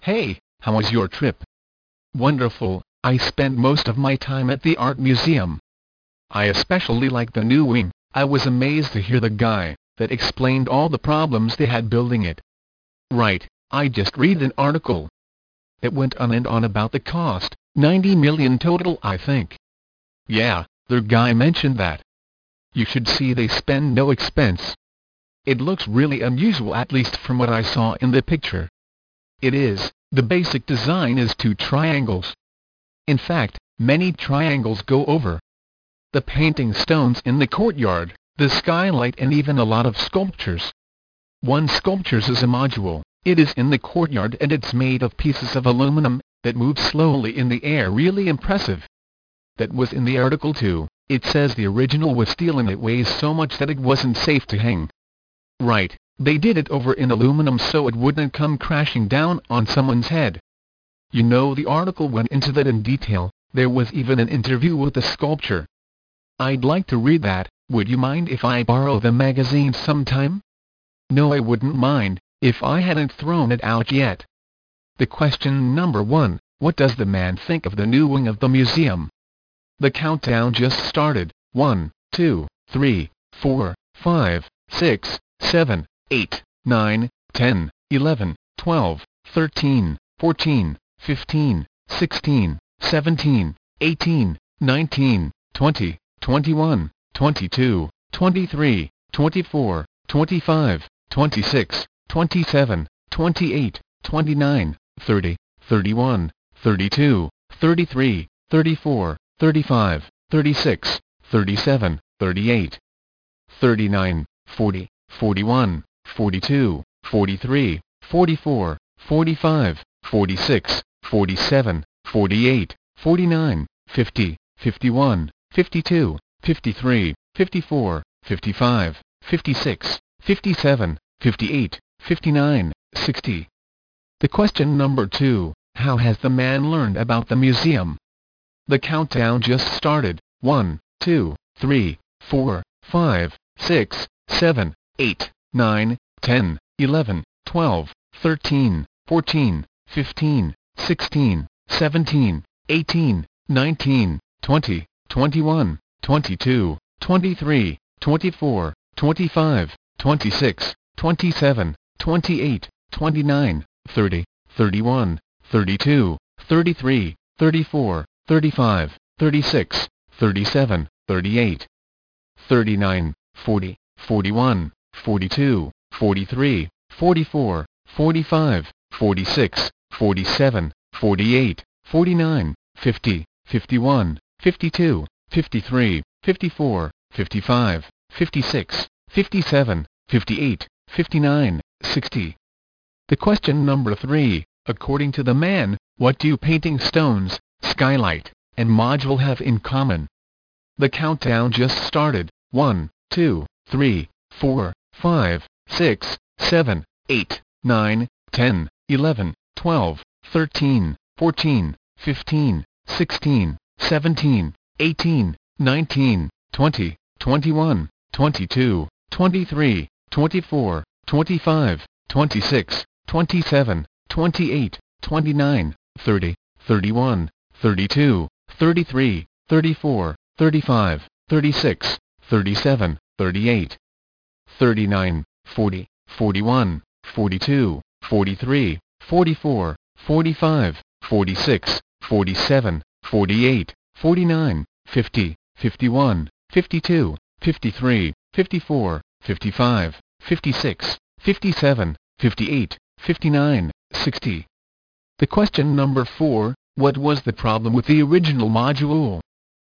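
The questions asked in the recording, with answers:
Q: what was the problem with the original module?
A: It was made of steel and was too heavy to hang safely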